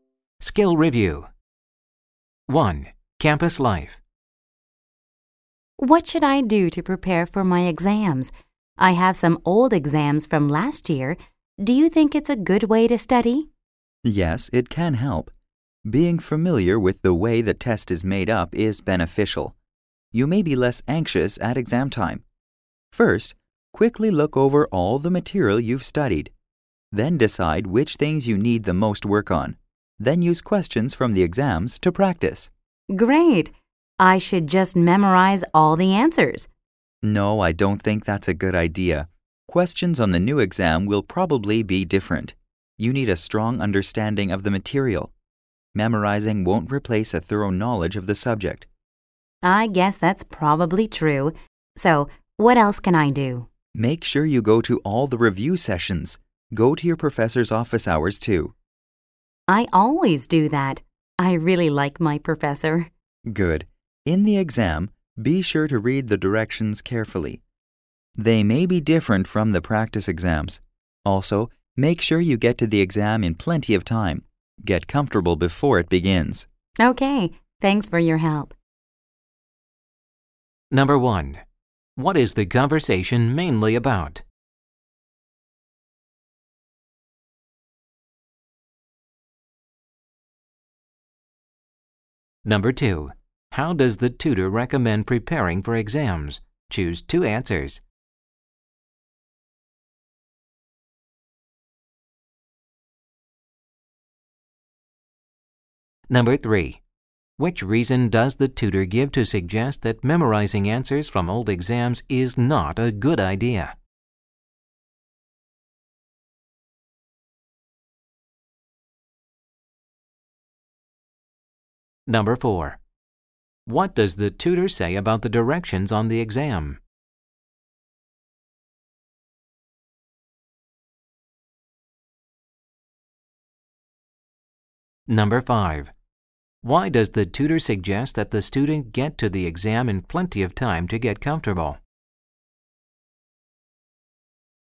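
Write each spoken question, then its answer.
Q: What is the conversation mainly about?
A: How to prepare for exams

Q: Which reason does the tutor give to suggest that memorizing answers from old exams is not a good idea?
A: Questions on the new exam will probably be different

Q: What does the tutor say about the directions on the exam?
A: Read them carefully; they may differ from the practice exams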